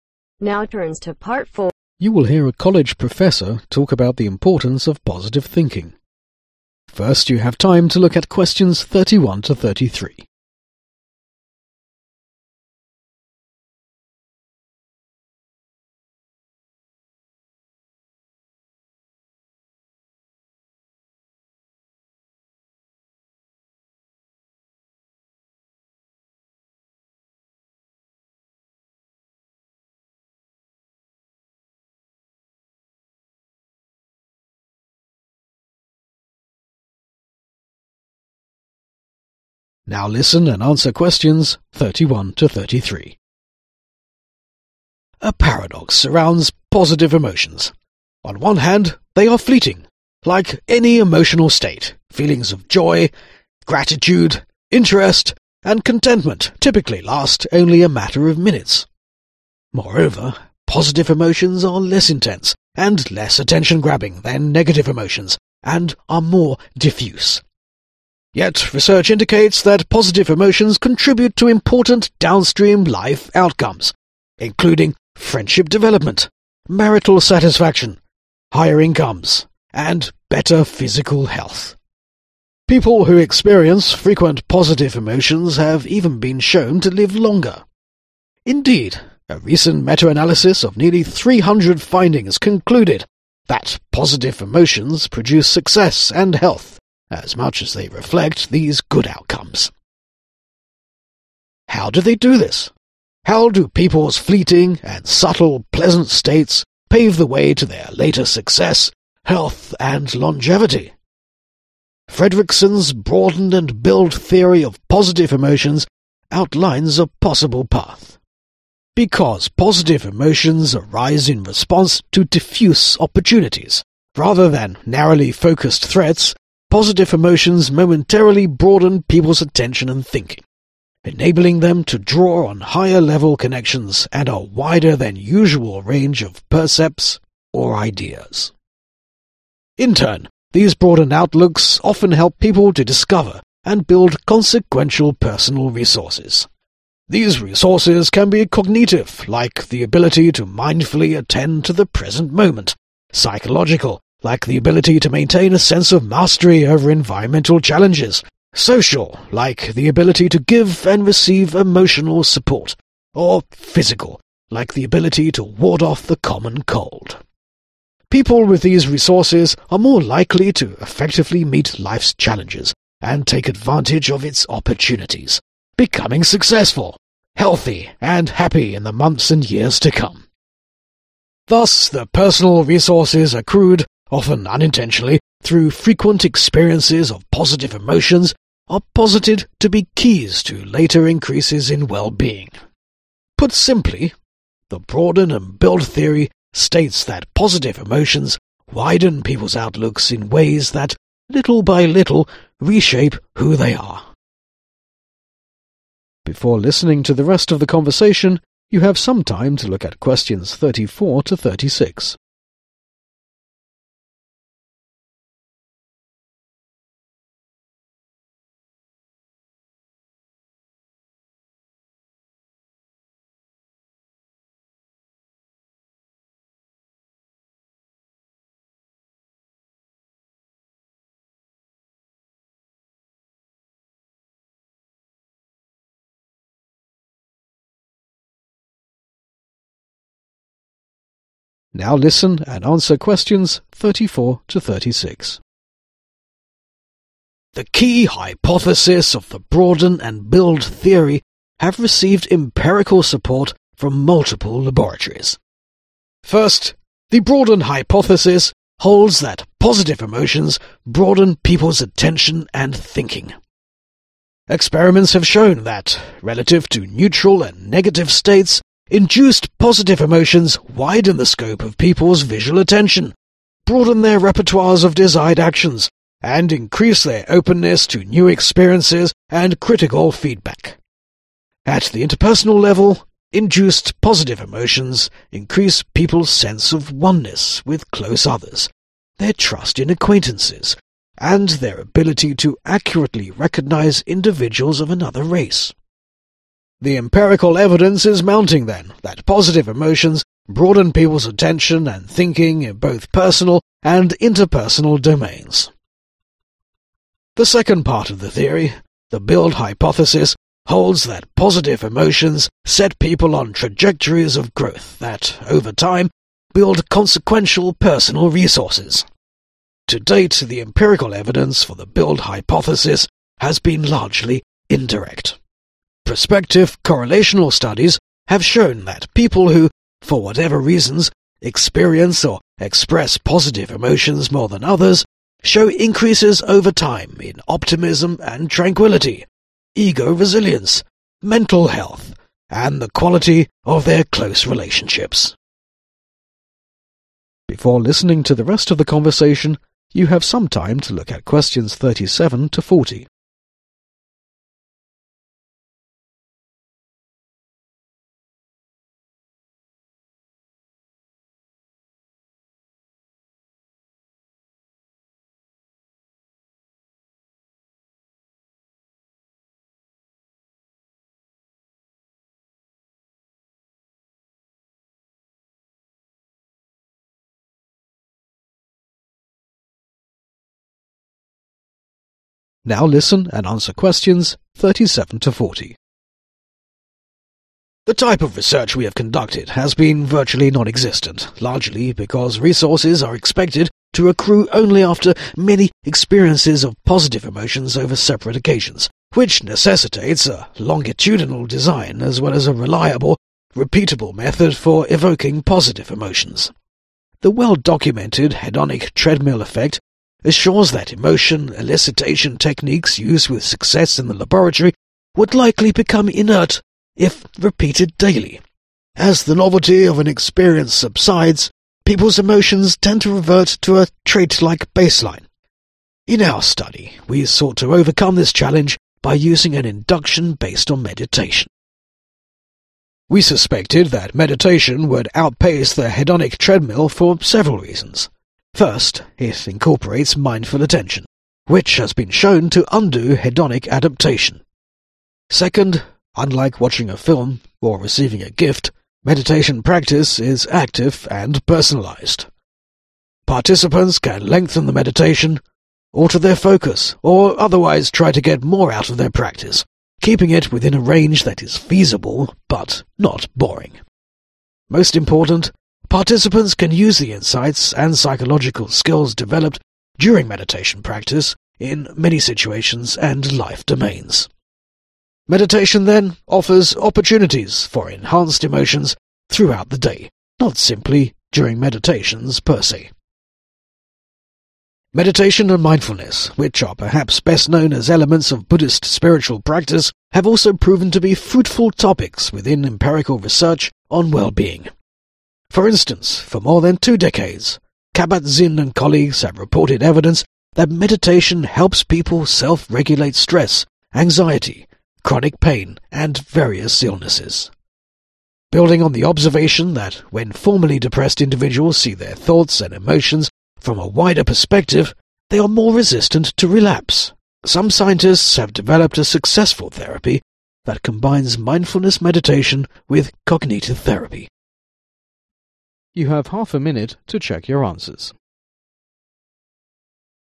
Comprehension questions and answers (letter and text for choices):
Complete the notes below in NO MORE THAN THREE WORDS for each answer.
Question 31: People who experience frequent positive emotions have even been shown to ............... longer.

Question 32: The speaker discusses Fredrickson's ................. theory in his talk.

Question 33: The broaden and build theory states that positive emotions ................ people's outlooks in ways that, little by little, reshape who they are.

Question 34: Which of the following is an effect of positive as shown by experiments ?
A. increase people's openness to new experiences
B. widen the scope of the people's thoughts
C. help reduce critical feedback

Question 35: Which hypothesis states that emotions set people on trajectories of growth ?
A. The broaden hypothesis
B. The build hypothesis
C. The broaden and build hypothesis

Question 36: The build hypothesis is primarily supported by what type of evidence ?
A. direct empirical evidence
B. word-of-mouth and hearsay evidence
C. indirect empirical evidence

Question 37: The well-documented ................... effect assures that emotion-elicitation techniques used with success in the laboratory would likely become inert if repeated daily.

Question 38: ................... has been shown to undo hedonic adaptation.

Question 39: Meditation and mindfulness, which are perhaps best known as elements of ................. spiritual practice.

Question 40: Building on their observation of depressed individuals, some scientist have developed a successful therapy that combines mindfulness meditation with ................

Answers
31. LIVE
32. BROADEN-AND-BUILD
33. WIDEN
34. A. increase people's openness to new experiences
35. B. The build hypothesis
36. C. indirect empirical evidence
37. HEDONIC TREADMILL
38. MINDFUL ATTENTION
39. BUDDHIST
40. COGNITIVE THERAPY